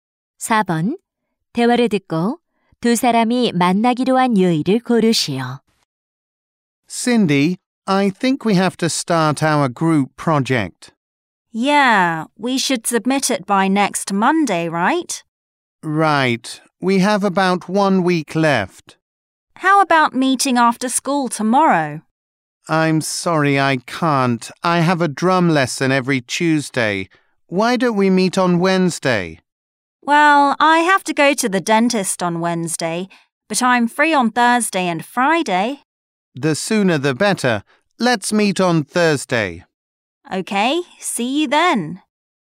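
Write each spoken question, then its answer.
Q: 대화를 듣고 두 사람이 만나기로 한 요일을 고르시오.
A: 목요일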